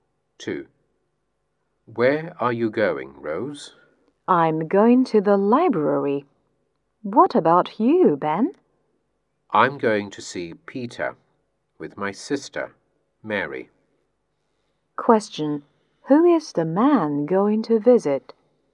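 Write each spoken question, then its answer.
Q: Question, who is the man going to visit?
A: Peter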